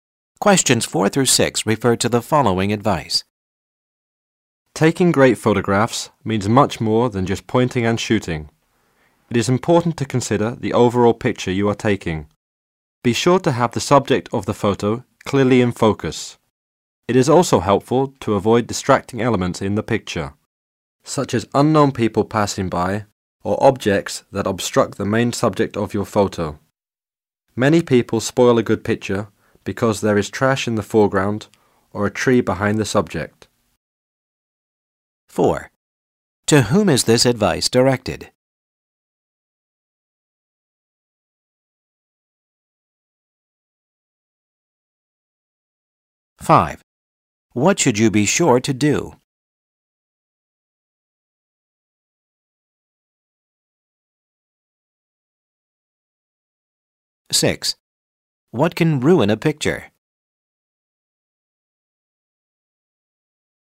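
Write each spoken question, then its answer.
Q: To whom is this advice directed?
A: People taking photographs

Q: What should you be sure to do?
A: Have the subject clearly in focus

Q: What can ruin a picture?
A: Distracting elements like trash in the foreground or a tree behind the subject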